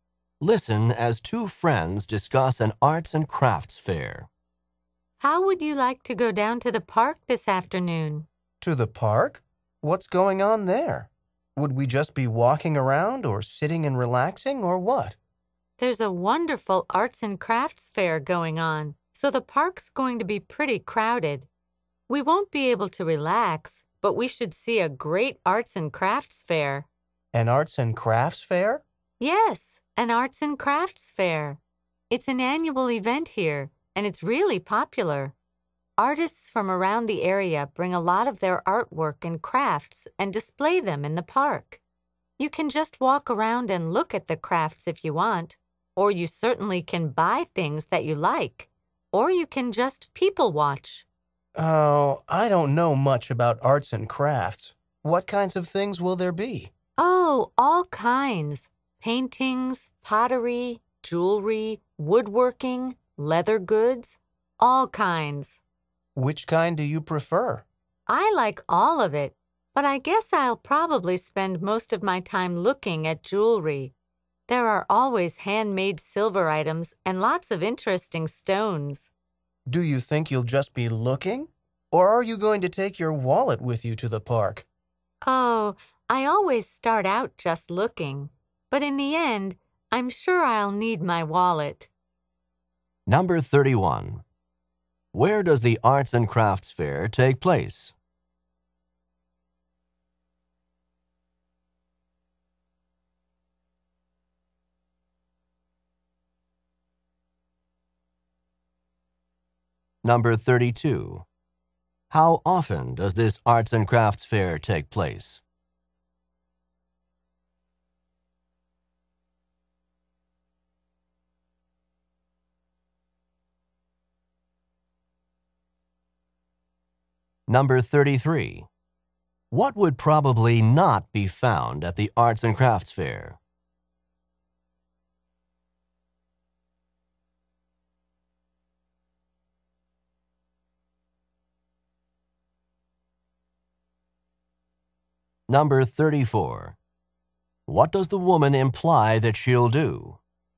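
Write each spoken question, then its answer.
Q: Where does the Arts and Crafts Fair take place?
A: In the park

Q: How often does this Arts and Crafts Fair take place?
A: Once a year (annually)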